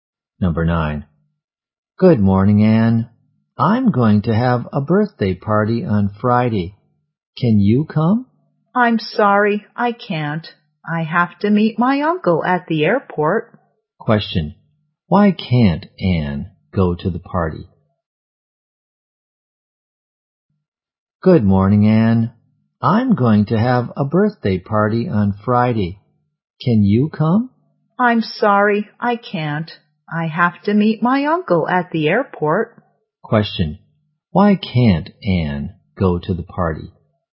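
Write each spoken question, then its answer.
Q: Question. Why can't Anne go to the party?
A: She has to meet her uncle at the airport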